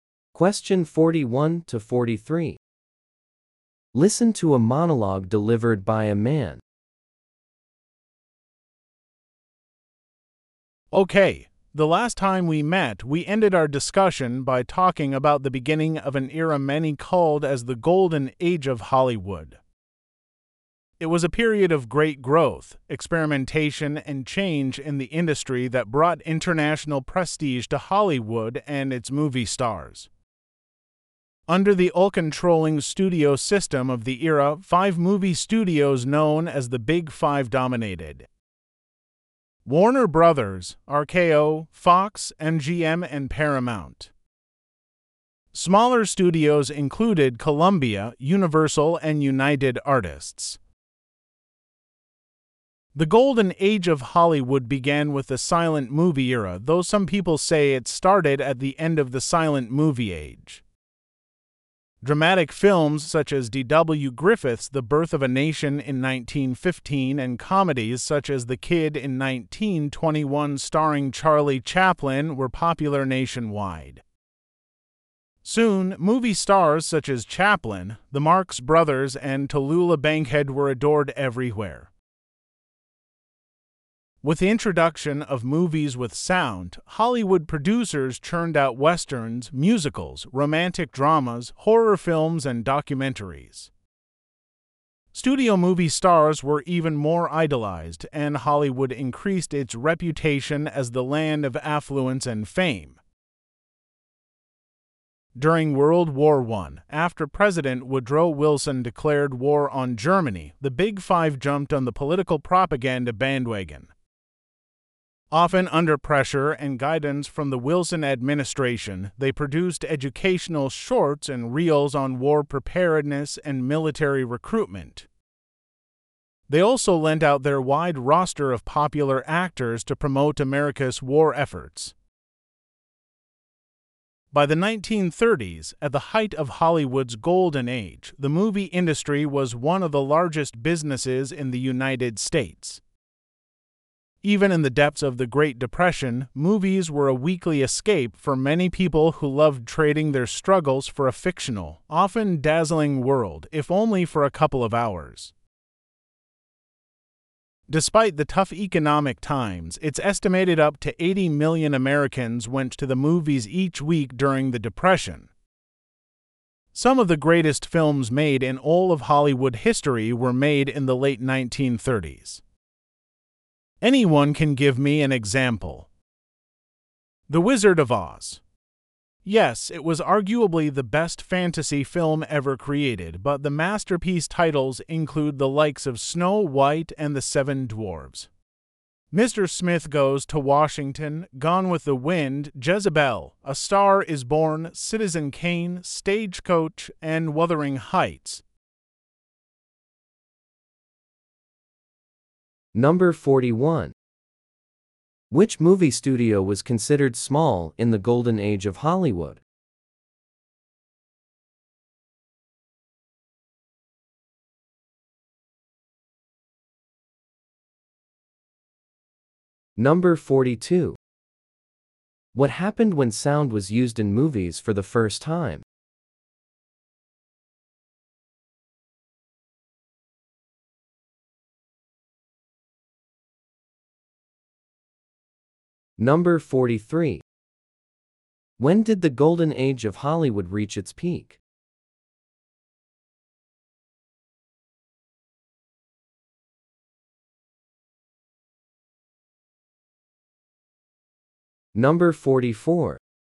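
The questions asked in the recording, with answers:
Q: Which movie studio was considered small in the golden age of Hollywood?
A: Columbia, Universal or United Artists

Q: What happened when sound was used in movies for the first time?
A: Producers made many kinds of films and the stars were idolized even more

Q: When did the golden age of Hollywood reach its peak?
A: In the 1930s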